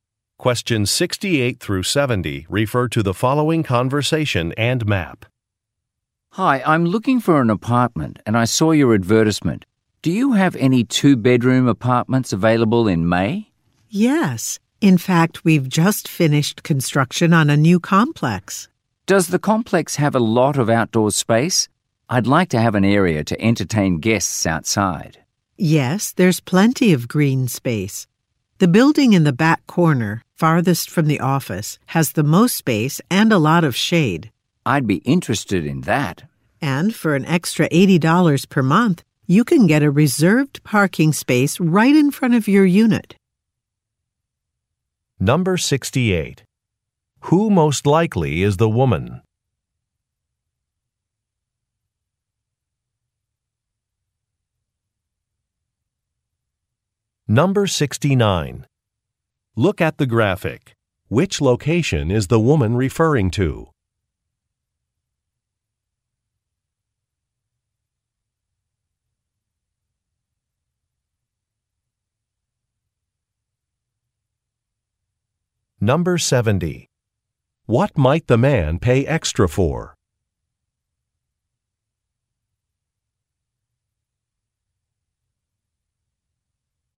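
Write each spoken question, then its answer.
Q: Who most likely is the woman?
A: A leasing agent

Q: What might the man pay extra for?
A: A reserved parking space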